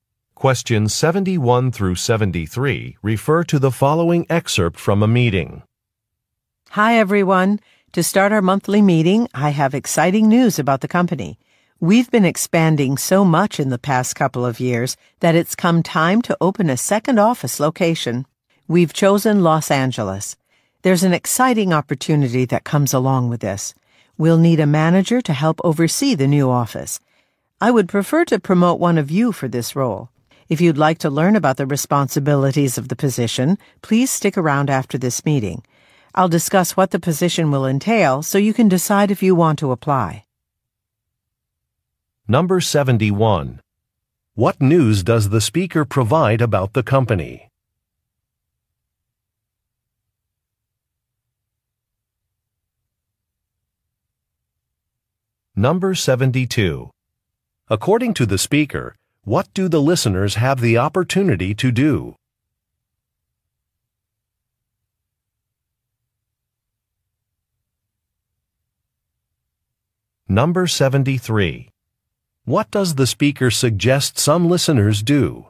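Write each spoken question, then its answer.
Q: What news does the speaker provide about the company?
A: It is opening a second office, in Los Angeles.

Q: According to the speaker, what do the listeners have the opportunity to do?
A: Be promoted to manager of the new office.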